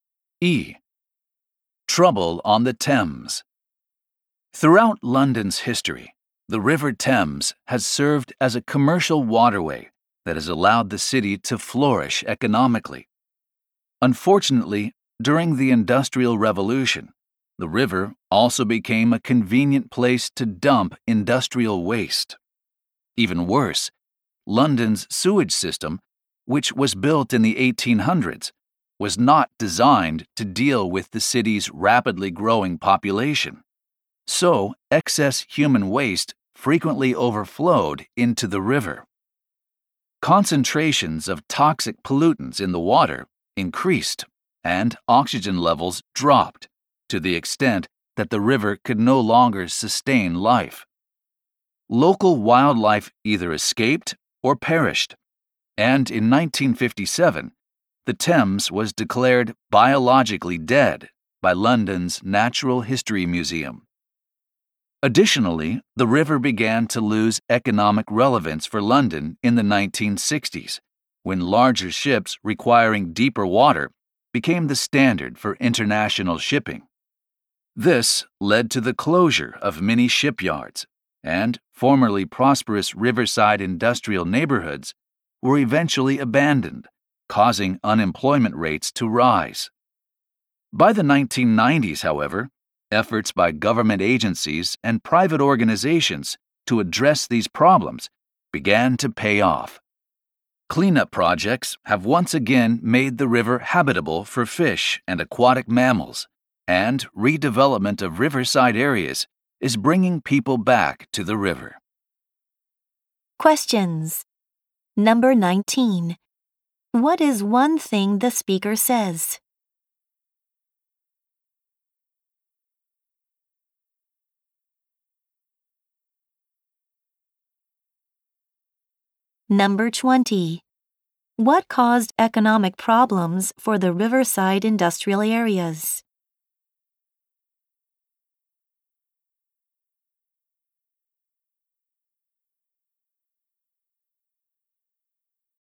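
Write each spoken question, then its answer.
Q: What caused economic problems for the riverside industrial areas?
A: Larger ships that needed deeper water became standard, so many shipyards closed.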